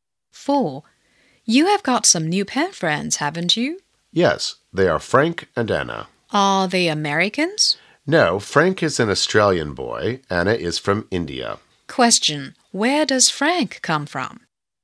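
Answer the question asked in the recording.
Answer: Australia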